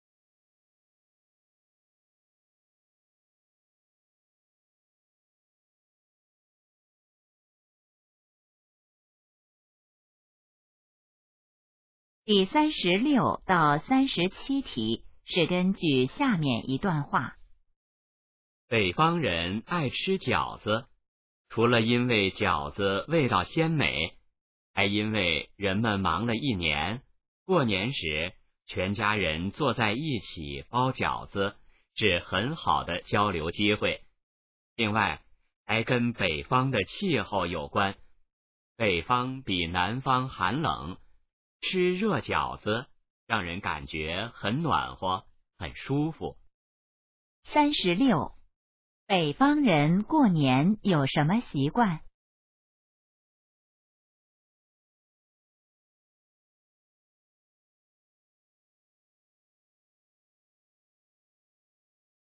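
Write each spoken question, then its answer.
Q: 北方人过年有什么习惯?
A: 全家一起包饺子、吃饺子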